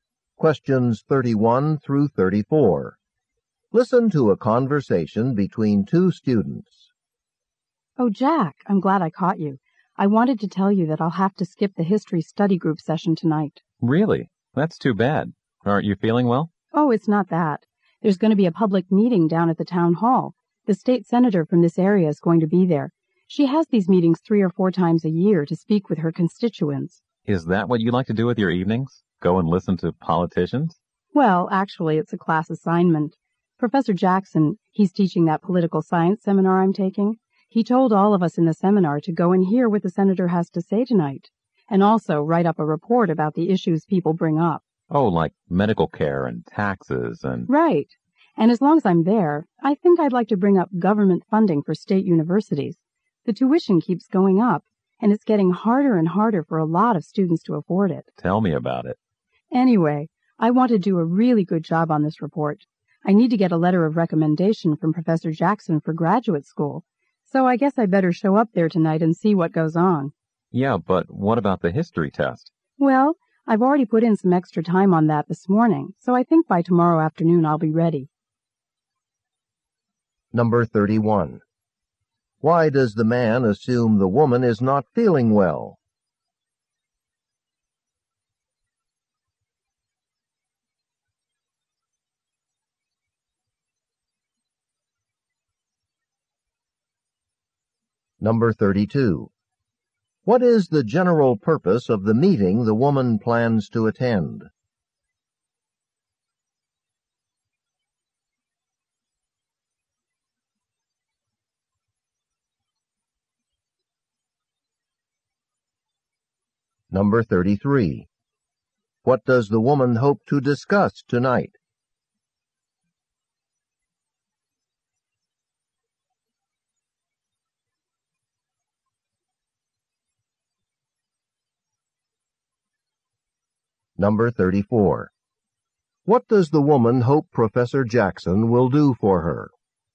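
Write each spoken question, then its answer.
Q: Why does the man assume the woman is not feeling well?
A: She says she will skip the study group session

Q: What is the general purpose of the meeting the woman plans to attend?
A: For the state senator to speak with her constituents

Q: What does the woman hope to discuss tonight?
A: Government funding for state universities

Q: What does the woman hope Professor Jackson will do for her?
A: Write her a letter of recommendation for graduate school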